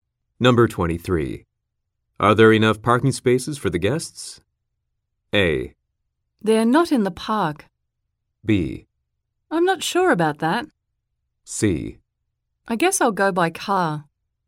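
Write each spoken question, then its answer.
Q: Are there enough parking spaces for the guests?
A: B: I'm not sure about that.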